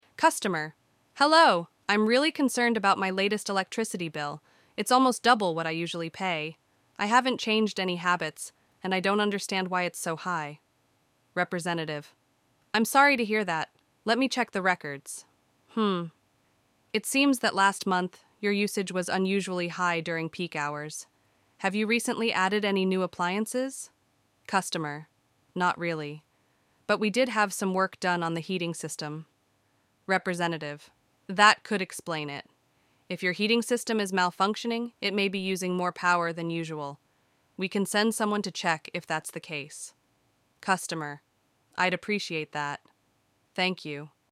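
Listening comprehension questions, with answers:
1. What is the customer's main concern?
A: Their electricity bill is unexpectedly high.

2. What does the representative suggest as a solution?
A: Sending a technician to check the heating system.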